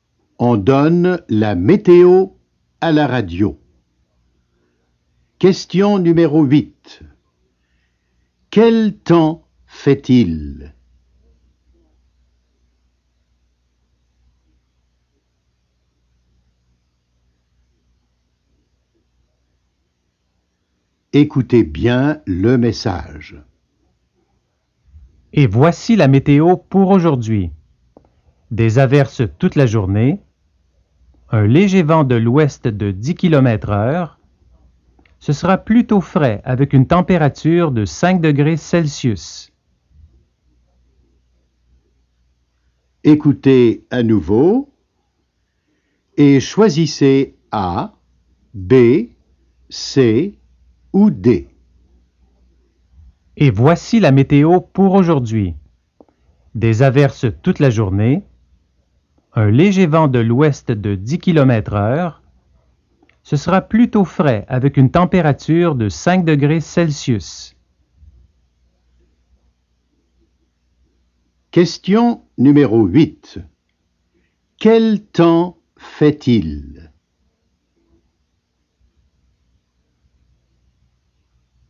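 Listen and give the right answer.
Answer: Il pleut (des averses), avec un léger vent et une température fraîche de 5 degrés.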